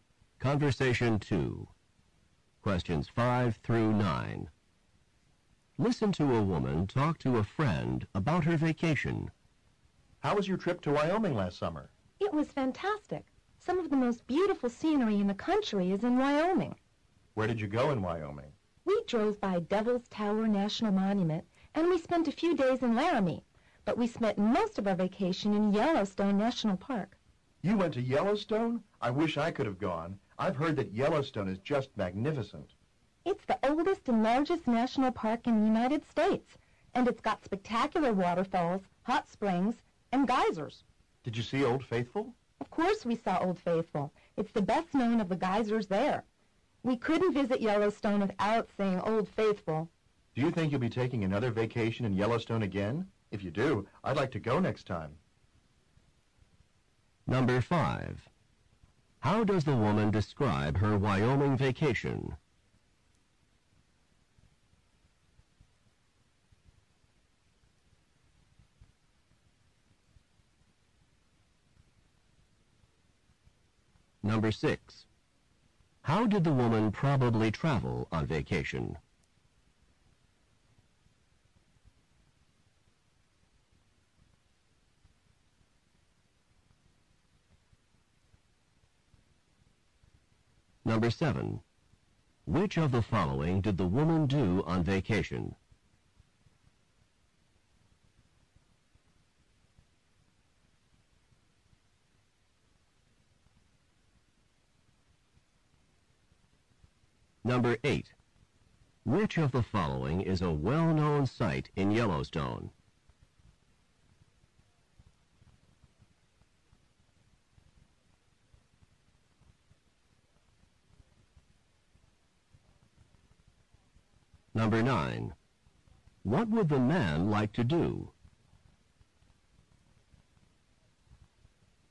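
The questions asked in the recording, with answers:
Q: How does the woman describe her Wyoming vacation?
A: Fantastic, with beautiful scenery

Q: How did the woman probably travel on vacation?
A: By car

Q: Which of the following is a well-known site in Yellowstone?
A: Old Faithful

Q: What would the man like to do?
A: Go to Yellowstone with her next time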